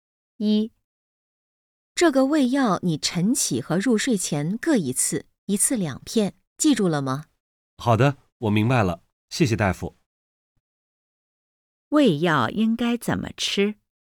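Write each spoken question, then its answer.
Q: 胃药应该怎么吃?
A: 早上起床后和睡觉前各吃一次,每次两片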